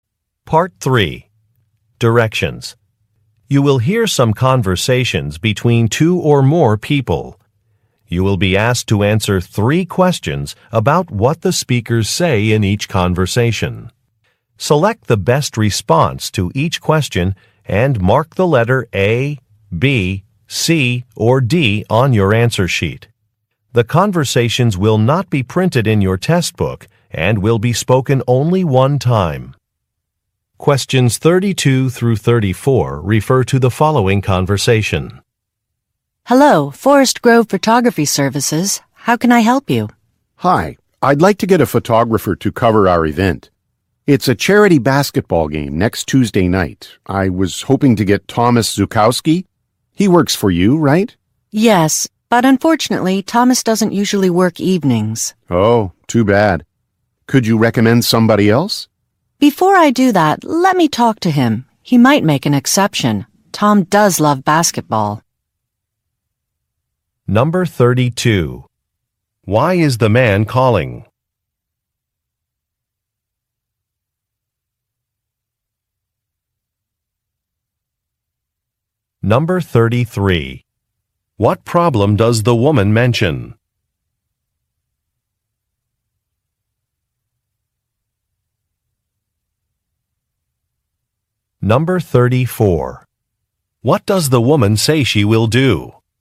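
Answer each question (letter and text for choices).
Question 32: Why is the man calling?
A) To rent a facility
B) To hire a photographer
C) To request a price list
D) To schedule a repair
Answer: B) To hire a photographer

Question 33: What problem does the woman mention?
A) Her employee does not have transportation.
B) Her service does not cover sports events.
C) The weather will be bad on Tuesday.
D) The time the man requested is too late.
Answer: D) The time the man requested is too late.

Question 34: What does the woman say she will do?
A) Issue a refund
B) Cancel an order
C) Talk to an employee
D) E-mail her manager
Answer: C) Talk to an employee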